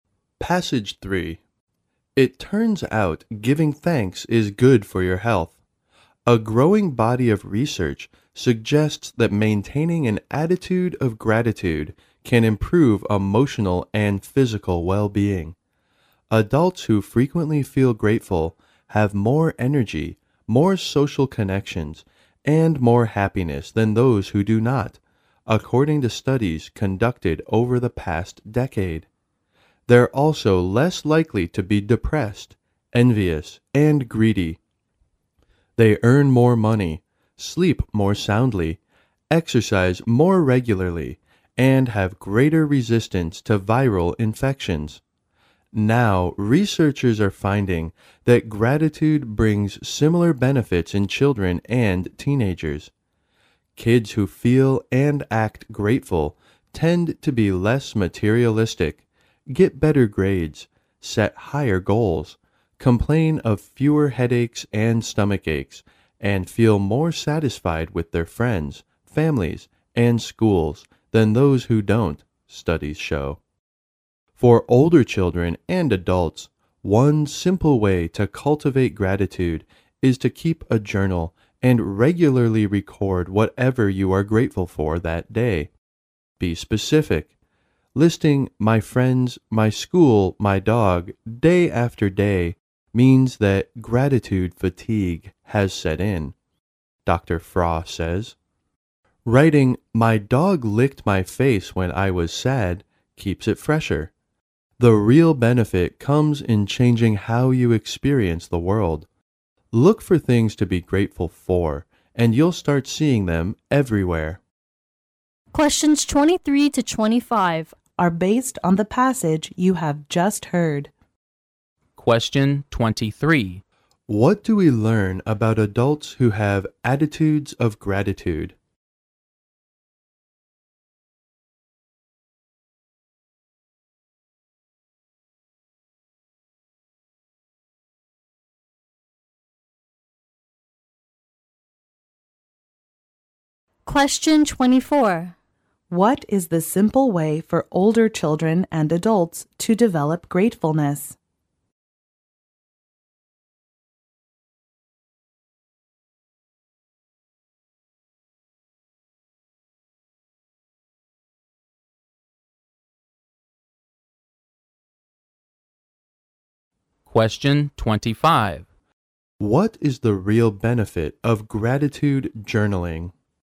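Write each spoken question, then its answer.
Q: What do we learn about adults who have attitudes of gratitude?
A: They have more energy, social connections and happiness

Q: What is the simple way for older children and adults to develop gratefulness?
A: Keep a gratitude journal

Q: What is the real benefit of gratitude journaling?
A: It changes how you experience the world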